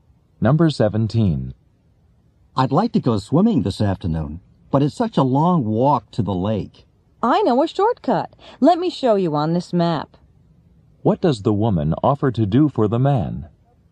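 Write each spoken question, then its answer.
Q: What does the woman offer to do for the man?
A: Show him a shortcut on the map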